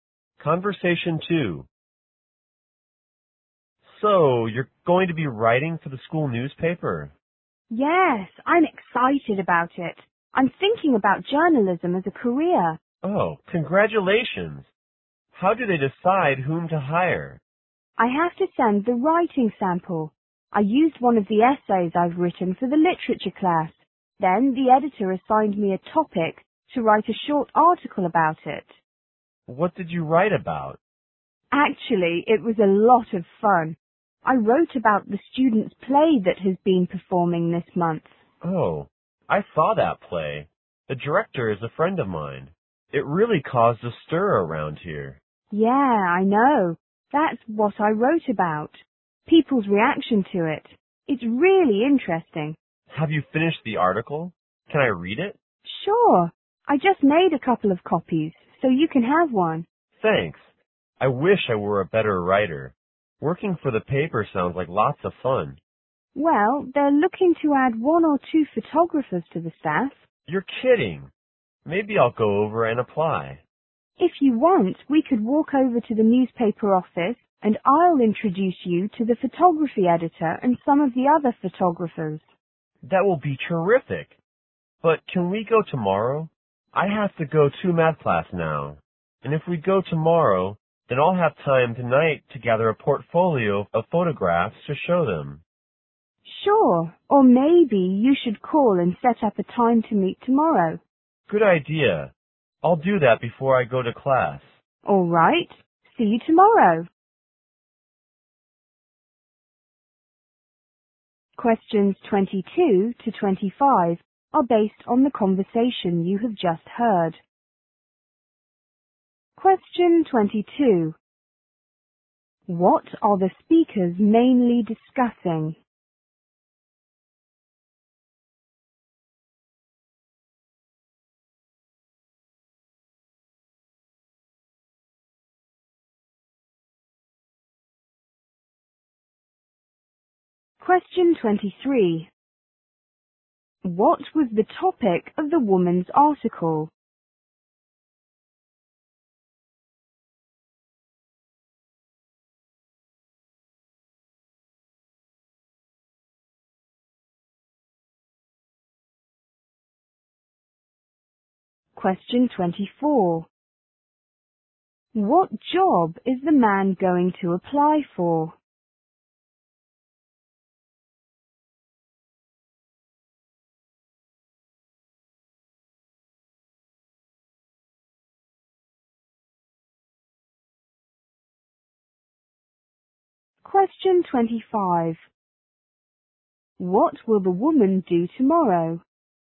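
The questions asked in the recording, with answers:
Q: What are the speakers mainly discussing?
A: The woman's new job writing for the school newspaper.

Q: What was the topic of the woman's article?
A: How people reacted to the students' play.

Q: What job is the man going to apply for?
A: Photographer for the school newspaper.

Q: What will the woman do tomorrow?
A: Take the man to the newspaper office and introduce him to the photography editor.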